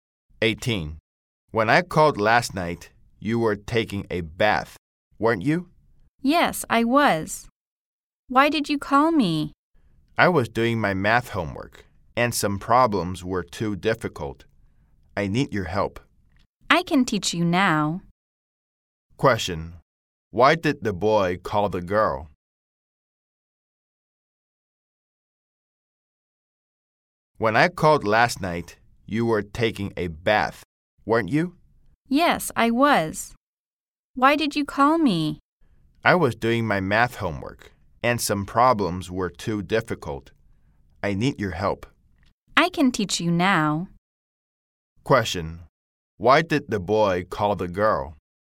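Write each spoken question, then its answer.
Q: Why did the boy call the girl?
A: He needed help with his difficult math homework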